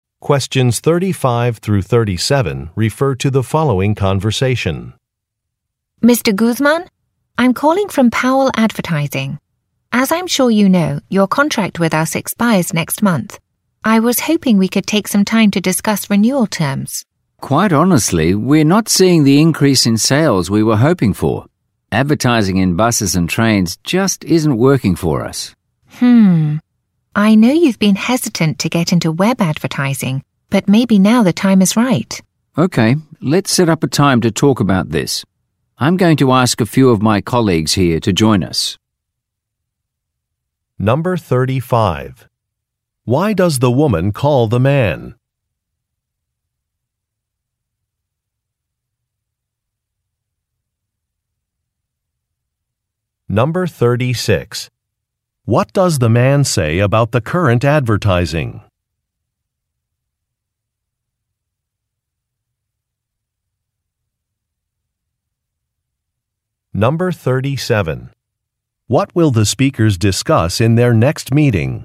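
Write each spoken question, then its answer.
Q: Why does the woman call the man?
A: To discuss renewing his advertising contract

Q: What does the man say about the current advertising?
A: It isn't increasing sales as hoped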